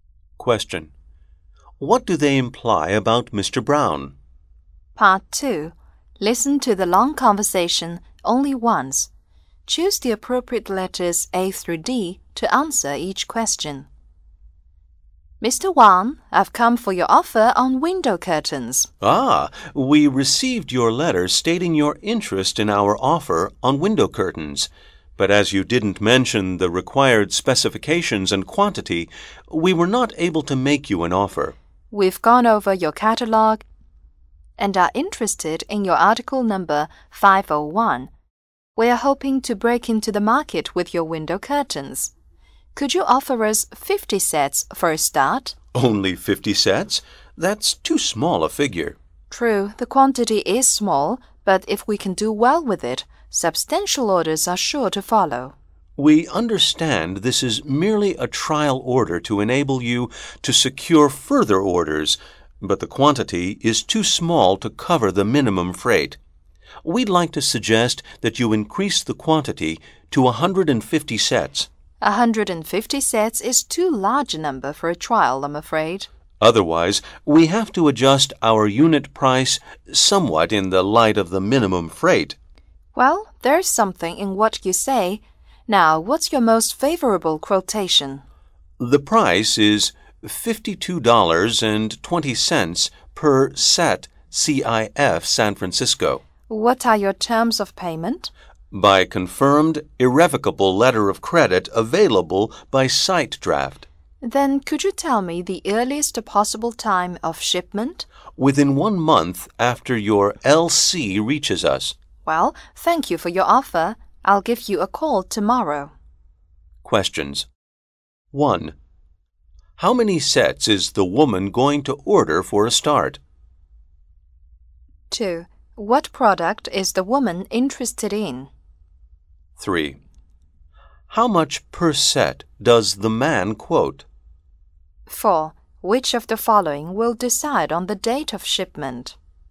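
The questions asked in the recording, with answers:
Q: What product is the woman interested in?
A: Window curtains (article number 501)

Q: How much per set does the man quote?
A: $52.20 per set CIF San Francisco

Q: Which of the following will decide on the date of shipment?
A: When the letter of credit reaches the seller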